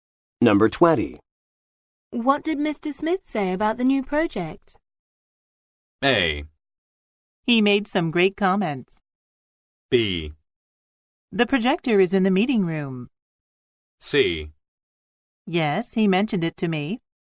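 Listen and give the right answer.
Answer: A: He made some great comments.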